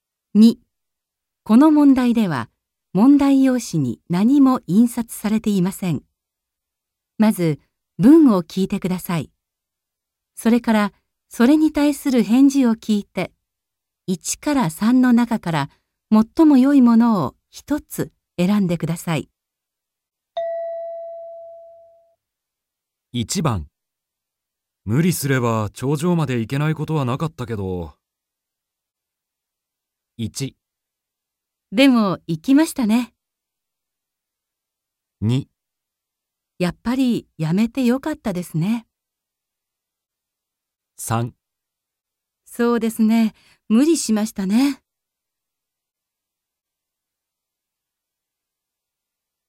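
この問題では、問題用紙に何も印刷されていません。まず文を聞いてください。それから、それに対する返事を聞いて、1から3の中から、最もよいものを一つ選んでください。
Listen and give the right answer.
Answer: やっぱりやめてよかったですね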